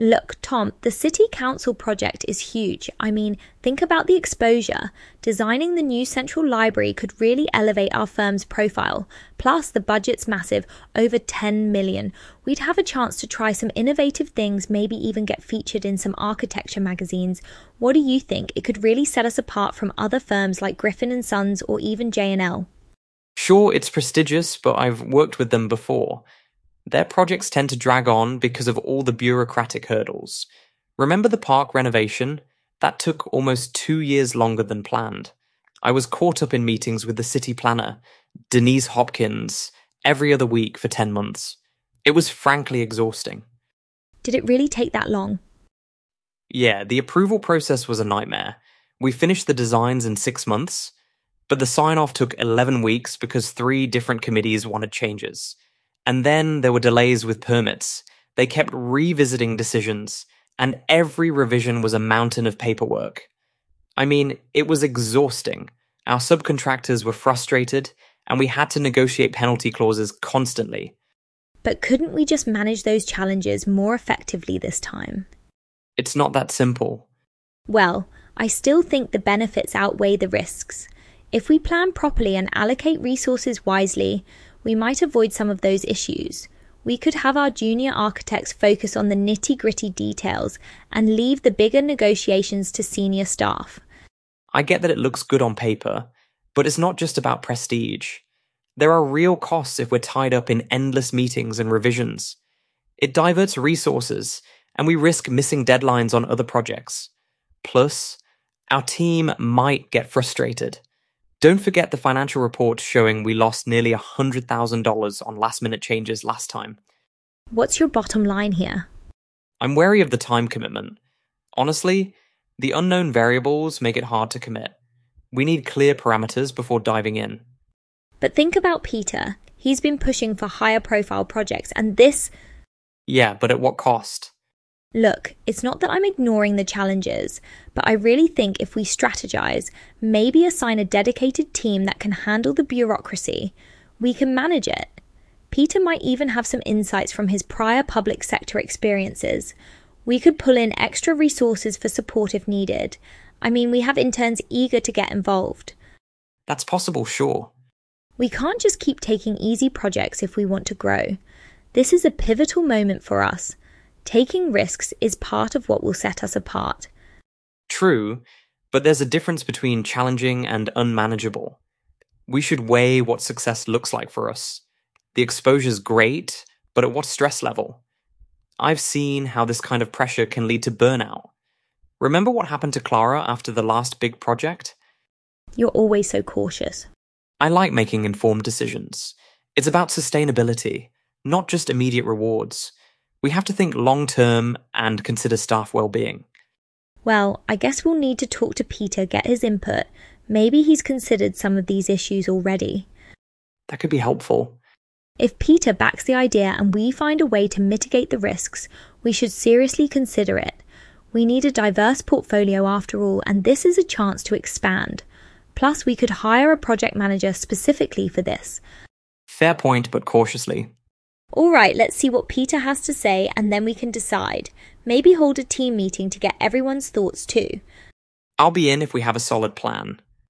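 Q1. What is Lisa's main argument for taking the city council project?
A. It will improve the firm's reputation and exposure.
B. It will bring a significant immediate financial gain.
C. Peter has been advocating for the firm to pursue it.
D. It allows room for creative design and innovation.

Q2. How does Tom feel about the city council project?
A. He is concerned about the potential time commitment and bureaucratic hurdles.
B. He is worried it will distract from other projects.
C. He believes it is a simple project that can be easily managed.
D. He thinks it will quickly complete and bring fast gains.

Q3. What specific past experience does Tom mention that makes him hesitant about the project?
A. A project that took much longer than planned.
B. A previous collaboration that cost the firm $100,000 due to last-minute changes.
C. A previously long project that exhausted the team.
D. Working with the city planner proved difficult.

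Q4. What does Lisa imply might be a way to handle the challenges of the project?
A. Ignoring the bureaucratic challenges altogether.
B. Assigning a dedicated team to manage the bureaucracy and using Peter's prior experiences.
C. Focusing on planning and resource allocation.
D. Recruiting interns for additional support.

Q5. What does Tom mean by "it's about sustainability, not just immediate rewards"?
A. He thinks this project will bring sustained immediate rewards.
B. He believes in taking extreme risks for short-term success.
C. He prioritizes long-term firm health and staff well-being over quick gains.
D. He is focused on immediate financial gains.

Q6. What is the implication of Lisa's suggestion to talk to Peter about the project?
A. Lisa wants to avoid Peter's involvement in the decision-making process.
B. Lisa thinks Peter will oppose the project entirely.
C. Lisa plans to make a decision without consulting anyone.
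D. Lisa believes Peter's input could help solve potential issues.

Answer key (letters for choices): 1A, 2A, 3A, 4B, 5C, 6D

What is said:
Lisa: Look, Tom, the city council project is huge. I mean, think about the exposure! Designing the new central library could really elevate our firm's profile. Plus, the budget's massive—over $10 million. We'd have a chance to try some innovative things, maybe even get featured in some architecture magazines. What do you think? It could really set us apart from other firms like Griffin and Sons or even J&L.
Tom: Sure, it's prestigious, but I've worked with them before. Their projects tend to drag on because of all the bureaucratic hurdles. Remember the park renovation? That took almost two years longer than planned. I was caught up in meetings with the city planner, Denise Hopkins, every other week for ten months. It was frankly exhausting.
Lisa: Did it really take that long?
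Tom: Yeah, the approval process was a nightmare. We finished the designs in six months, but the sign-off took eleven weeks because three different committees wanted changes. And then, there were delays with permits. They kept revisiting decisions, and every revision was a mountain of paperwork. I mean, it was exhausting. Our subcontractors were frustrated, and we had to negotiate penalty clauses constantly.
Lisa: But couldn't we just manage those challenges more effectively this time?
Tom: It's not that simple.
Lisa: Well, I still think the benefits outweigh the risks. If we plan properly and allocate resources wisely, we might avoid some of those issues. We could have our junior architects focus on the nitty-gritty details and leave the bigger negotiations to senior staff.
Tom: I get that it looks good on paper, but it's not just about prestige. There are real costs if we're tied up in endless meetings and revisions. 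It diverts resources, and we risk missing deadlines on other projects. Plus, our team might get frustrated. Don't forget the financial reports showing we lost nearly $100,000 on last-minute changes last time.
Lisa: What's your bottom line here?
Tom: I'm wary of the time commitment. Honestly, the unknown variables make it hard to commit. We need clear parameters before diving in.
Lisa: But think about Peter—he's been pushing for higher-profile projects, and this—
Tom: Yeah, but at what cost?
Lisa: Look, it's not that I'm ignoring the challenges, but I really think if we strategize, maybe assign a dedicated team that can handle the bureaucracy, we can manage it. Peter might even have some insights from his prior public-sector experiences. We could pull in extra resources for support if needed. I mean, we have interns eager to get involved.
Tom: That's possible, sure.
Lisa: We can't just keep taking easy projects if we want to grow. 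This is a pivotal moment for us. Taking risks is part of what will set us apart.
Tom: True, but there's a difference between challenging and unmanageable. We should weigh what success looks like for us. The exposure's great, but at what stress level? I've seen how this kind of pressure can lead to burnout. Remember what happened to Clara after the last big project?
Lisa: You're always so cautious.
Tom: I like making informed decisions. It's about sustainability, not just immediate rewards. We have to think long-term and consider staff well-being.
Lisa: Well, I guess we'll need to talk to Peter, get his input. Maybe he's considered some of these issues already.
Tom: That could be helpful.
Lisa: If Peter backs the idea and we find a way to mitigate the risks, we should seriously consider it. We need a diverse portfolio, after all, and this is a chance to expand. Plus, we could hire a project manager specifically for this.
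Tom: Fair point, but cautiously.
Lisa: Alright, let's see what Peter has to say, and then we can decide. Maybe hold a team meeting to get everyone's thoughts too.
Tom: I'll be in if we have a solid plan.

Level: C1 Advanced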